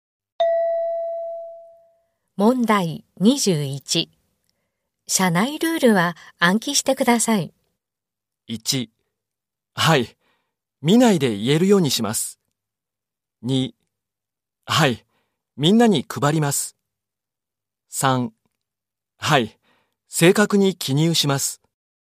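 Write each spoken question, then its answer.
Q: 社内ルールは暗記してください。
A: 1: はい。見ないで言えるようにします。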